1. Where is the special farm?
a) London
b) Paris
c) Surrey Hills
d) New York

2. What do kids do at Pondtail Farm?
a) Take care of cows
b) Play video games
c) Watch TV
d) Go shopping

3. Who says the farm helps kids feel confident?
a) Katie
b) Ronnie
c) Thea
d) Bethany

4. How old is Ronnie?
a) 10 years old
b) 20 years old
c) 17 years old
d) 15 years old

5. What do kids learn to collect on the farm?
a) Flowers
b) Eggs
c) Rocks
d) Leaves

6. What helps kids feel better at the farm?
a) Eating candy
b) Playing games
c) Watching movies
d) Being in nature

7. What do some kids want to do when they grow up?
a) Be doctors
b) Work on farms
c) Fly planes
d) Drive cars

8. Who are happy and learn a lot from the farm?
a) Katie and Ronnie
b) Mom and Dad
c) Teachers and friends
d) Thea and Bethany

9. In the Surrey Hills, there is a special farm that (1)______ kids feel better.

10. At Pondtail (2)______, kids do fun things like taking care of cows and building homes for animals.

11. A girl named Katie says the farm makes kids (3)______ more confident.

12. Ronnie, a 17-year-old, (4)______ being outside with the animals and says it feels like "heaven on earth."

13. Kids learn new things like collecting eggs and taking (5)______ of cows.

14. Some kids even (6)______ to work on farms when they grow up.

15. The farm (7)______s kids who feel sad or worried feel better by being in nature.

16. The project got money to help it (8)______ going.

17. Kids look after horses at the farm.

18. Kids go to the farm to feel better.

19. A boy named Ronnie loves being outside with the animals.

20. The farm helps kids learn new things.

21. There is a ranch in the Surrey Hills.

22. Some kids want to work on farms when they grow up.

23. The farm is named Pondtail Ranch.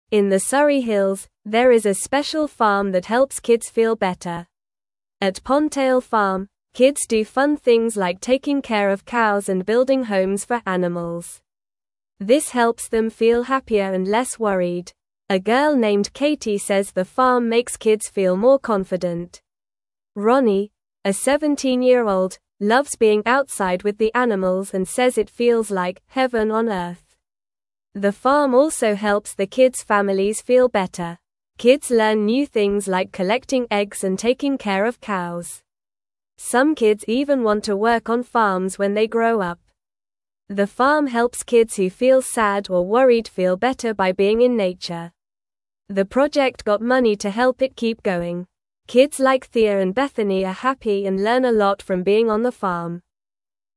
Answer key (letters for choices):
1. c
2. a
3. a
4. c
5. b
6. d
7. b
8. d
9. helps
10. Farm
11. feel
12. loves
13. care
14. want
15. help
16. keep
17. False
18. True
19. True
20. True
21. False
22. True
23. False

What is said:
In the Surrey Hills, there is a special farm that helps kids feel better. At Pondtail Farm, kids do fun things like taking care of cows and building homes for animals. This helps them feel happier and less worried. A girl named Katie says the farm makes kids feel more confident. Ronnie, a 17-year-old, loves being outside with the animals and says it feels like "heaven on earth."
The farm also helps the kids' families feel better. Kids learn new things like collecting eggs and taking care of cows. Some kids even want to work on farms when they grow up. The farm helps kids who feel sad or worried feel better by being in nature. The project got money to help it keep going. Kids like Thea and Bethany are happy and learn a lot from being on the farm.

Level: Level 1